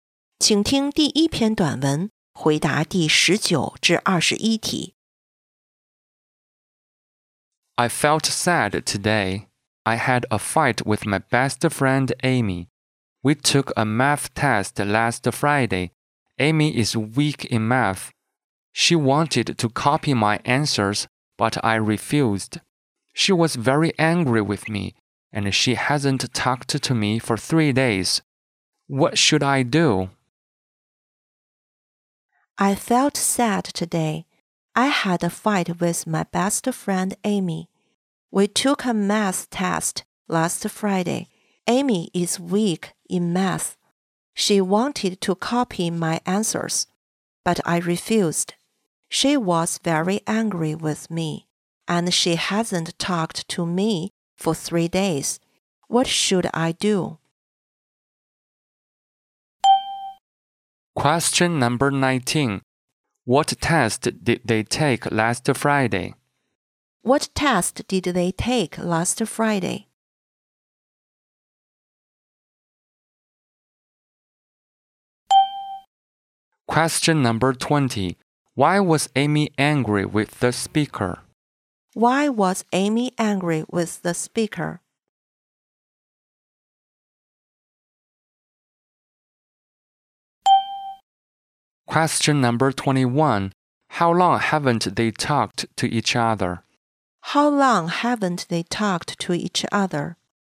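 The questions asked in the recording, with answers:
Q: What test did they take last Friday?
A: A math test

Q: Why was Amy angry with the speaker?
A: The speaker refused to let her copy the answers

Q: How long haven't they talked to each other?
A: 3 days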